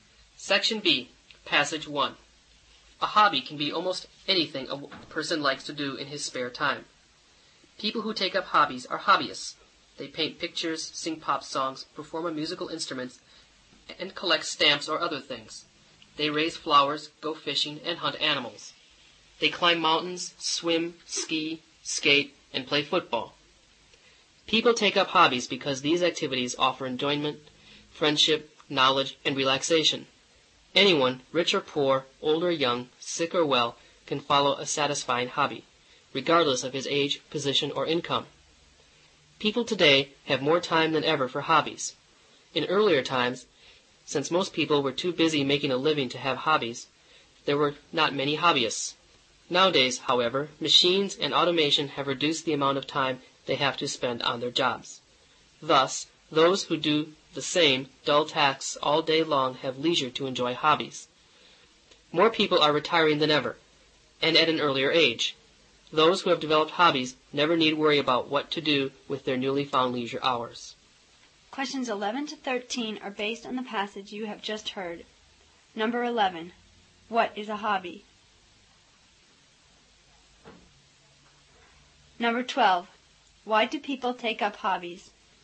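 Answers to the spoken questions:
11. Almost anything a person likes to do in his spare time
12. For enjoyment, friendship, knowledge and relaxation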